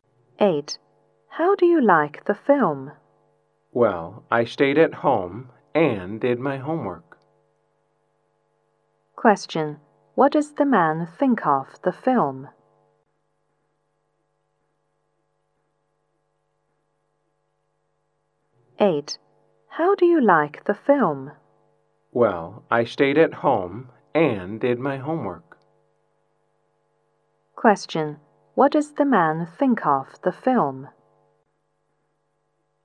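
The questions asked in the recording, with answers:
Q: What does the man think of the film?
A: He hasn't seen it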